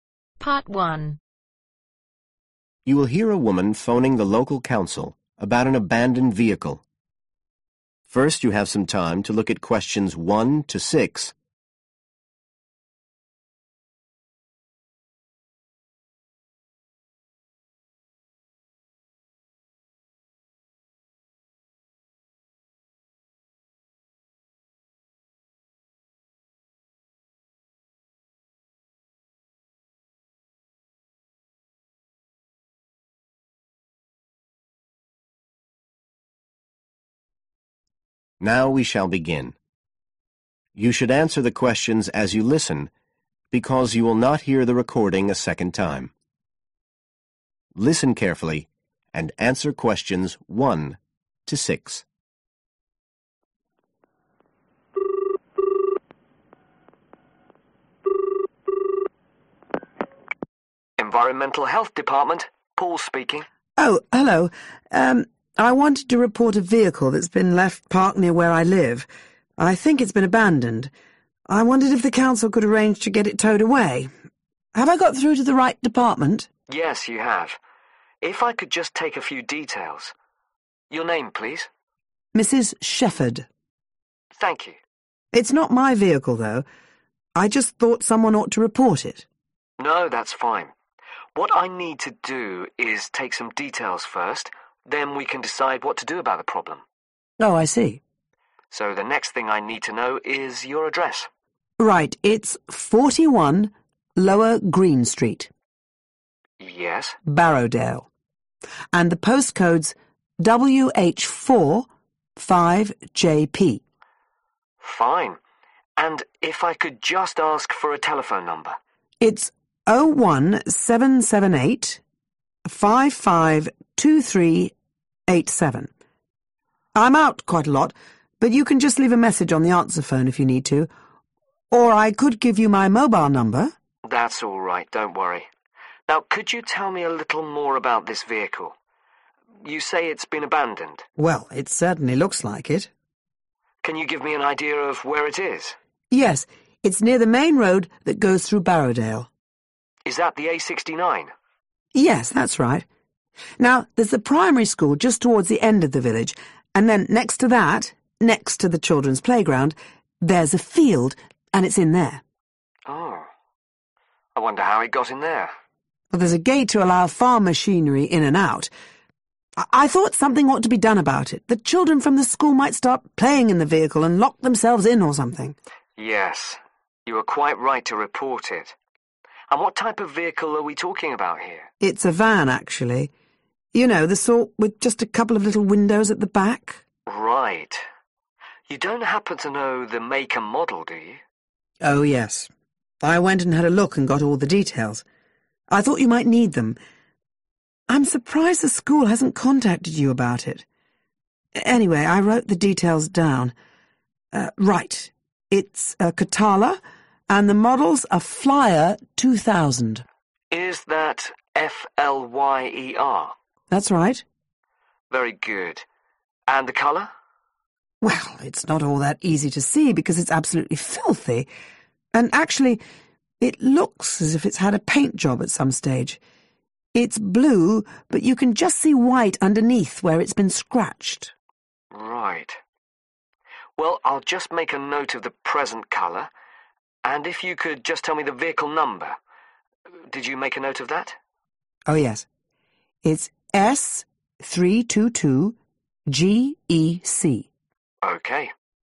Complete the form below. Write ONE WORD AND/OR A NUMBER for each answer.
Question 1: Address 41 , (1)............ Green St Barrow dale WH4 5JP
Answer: Lower

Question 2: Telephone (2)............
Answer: 01778 552387

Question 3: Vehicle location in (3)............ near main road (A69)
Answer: Field

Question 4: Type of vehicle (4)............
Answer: Van

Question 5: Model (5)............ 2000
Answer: Flyer

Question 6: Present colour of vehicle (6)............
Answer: Blue